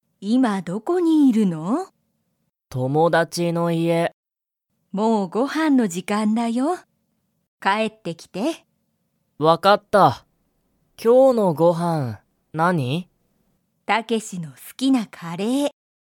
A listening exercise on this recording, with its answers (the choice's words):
タケシは、家いえに帰かえりますか?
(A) はい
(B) いいえ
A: はい

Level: Level 1